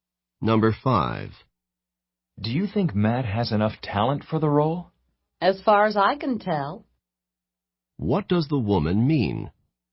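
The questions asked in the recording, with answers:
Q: What does the woman mean?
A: She thinks Matt has enough talent for the role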